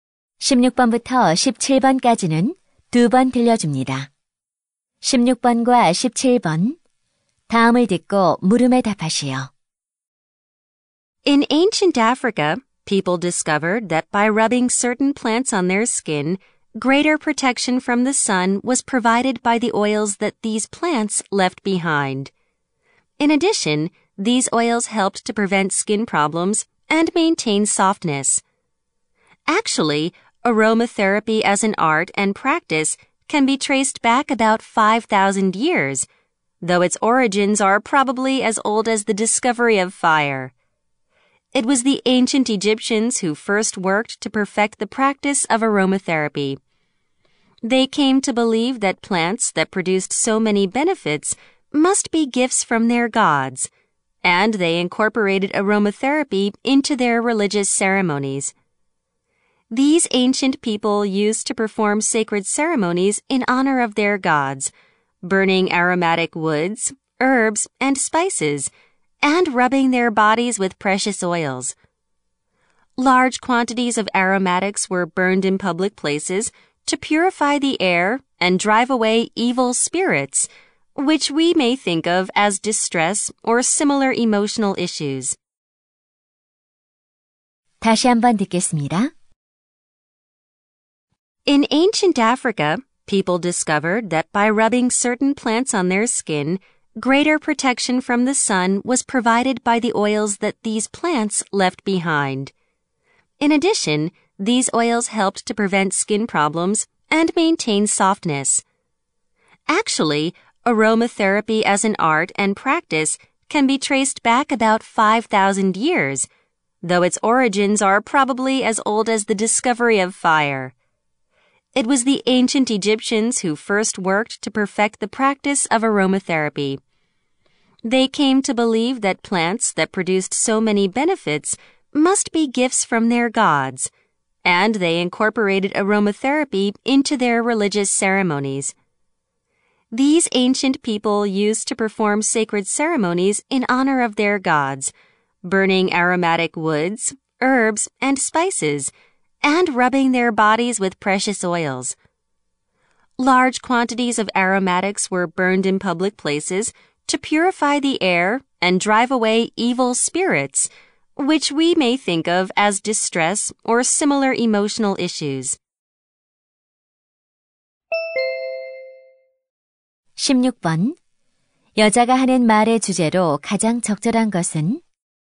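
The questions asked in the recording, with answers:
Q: 여자가 하는 말의 주제로 가장 적절한 것은?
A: 아로마테라피의 기원과 역사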